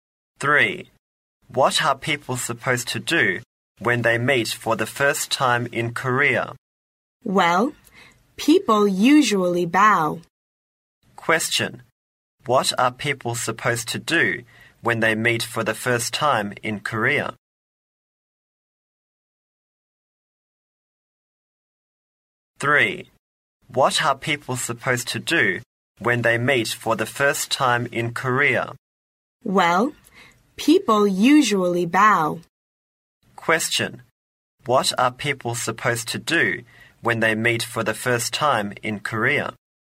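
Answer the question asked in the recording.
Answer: They usually bow.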